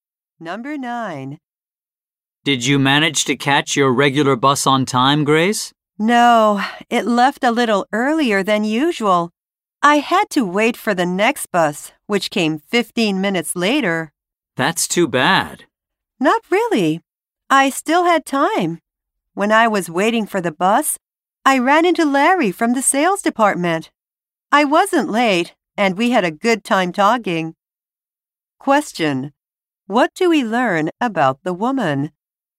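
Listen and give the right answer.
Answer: She missed her regular bus but met Larry and wasn't late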